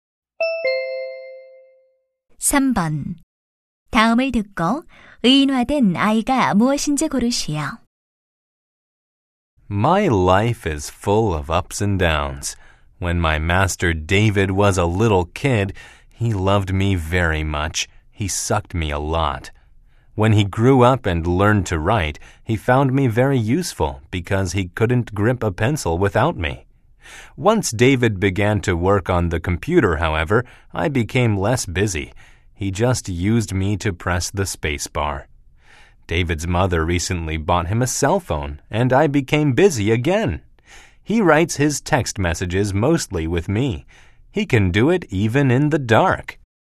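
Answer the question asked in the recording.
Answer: 엄지손가락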